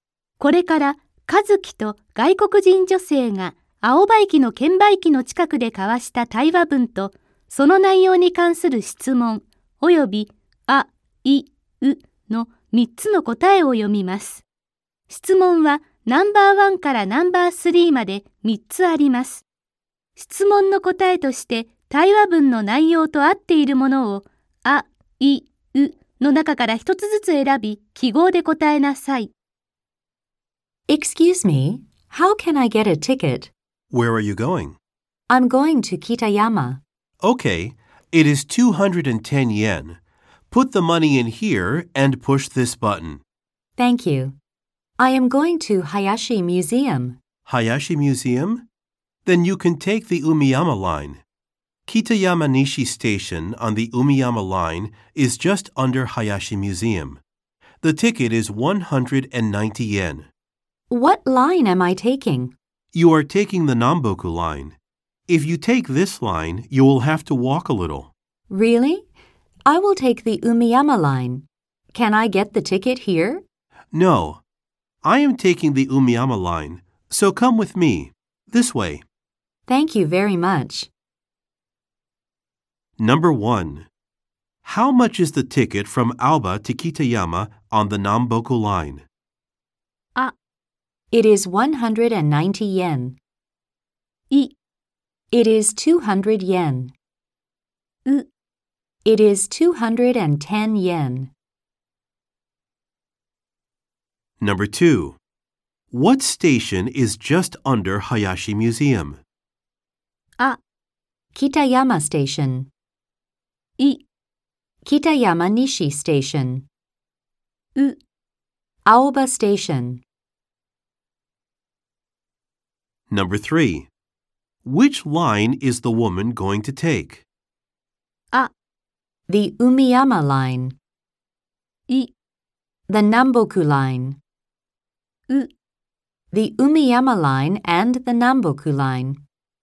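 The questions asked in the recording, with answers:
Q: How much is the ticket from Aoba to Kitayama on the Namboku line?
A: U: It is 210 yen.

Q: What station is just under Hayashi Museum?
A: I: Kitayama Nishi Station.

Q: Which line is the woman going to take?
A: A: The Umiyama Line.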